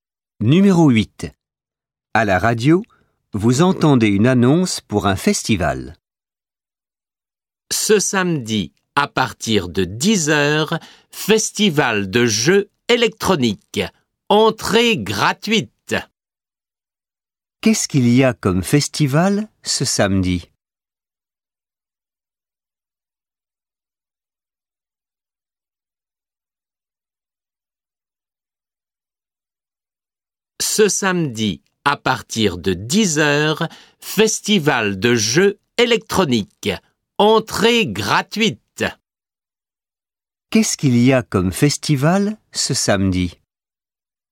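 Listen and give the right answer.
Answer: Un festival de jeux électroniques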